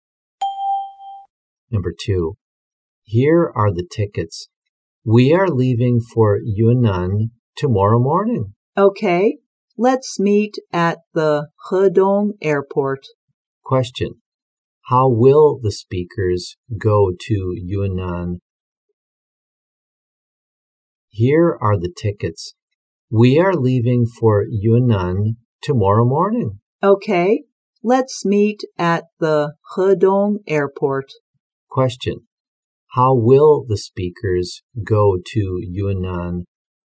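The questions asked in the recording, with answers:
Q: how will the speakers go to Yunnan?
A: By plane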